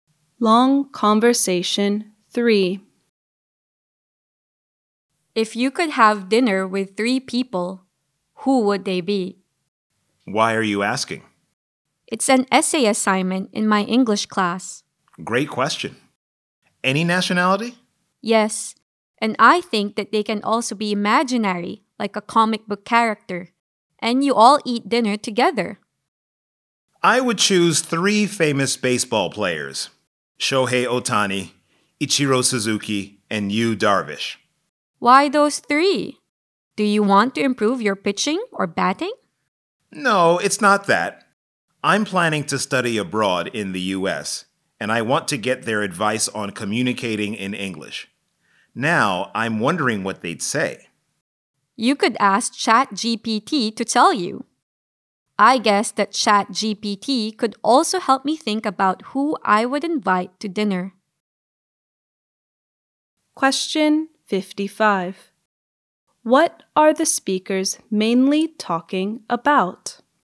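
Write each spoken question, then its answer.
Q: What are the speakers mainly talking about?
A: Which three people they would have dinner with (an essay assignment)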